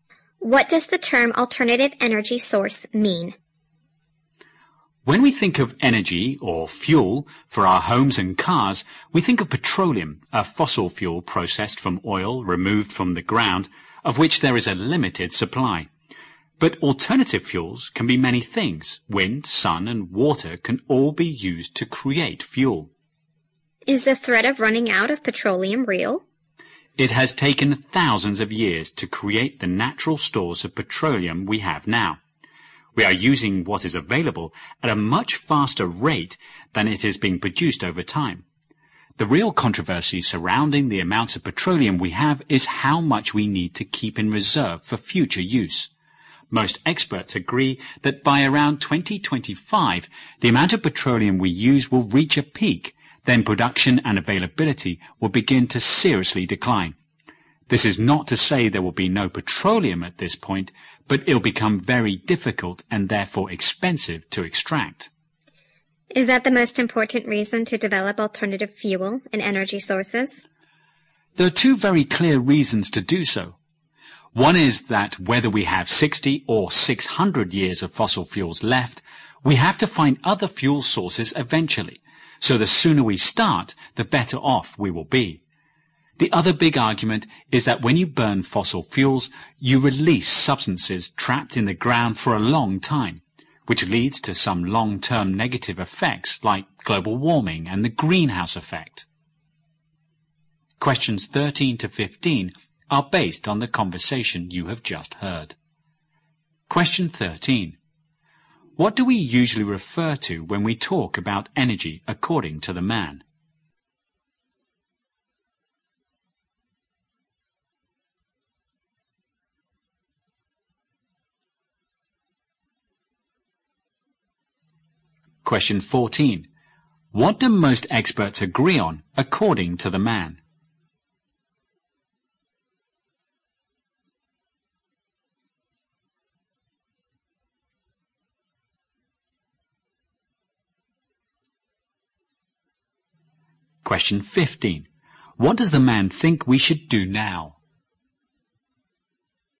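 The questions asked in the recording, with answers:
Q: What do we usually refer to when we talk about energy according to the man?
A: Petroleum, a fossil fuel processed from oil

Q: What do most experts agree on according to the man?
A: Petroleum use will peak around 2025, then production and availability will decline

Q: What does the man think we should do now?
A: Start developing alternative fuel and energy sources as soon as possible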